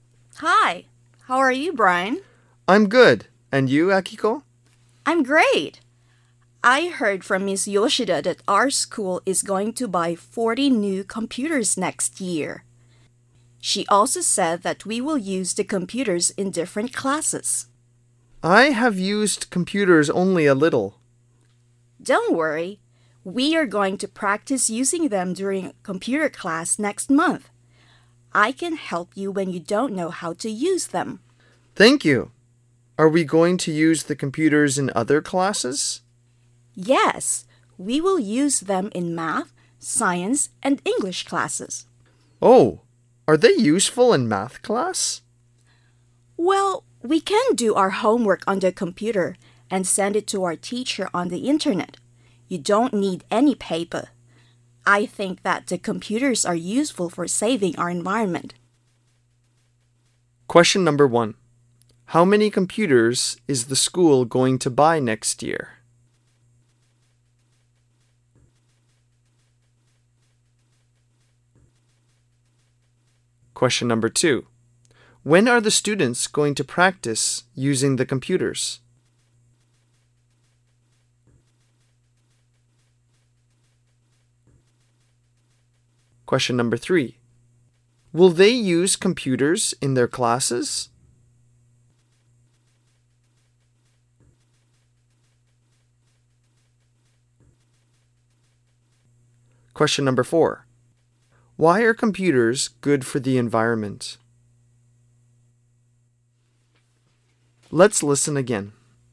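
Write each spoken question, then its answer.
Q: How many computers is the school going to buy next year?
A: 40

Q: When are the students going to practice using the computers?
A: During computer class next month

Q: Will they use computers in their classes?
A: Yes, in math, science, and English classes

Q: Why are computers good for the environment?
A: Because they don't need any paper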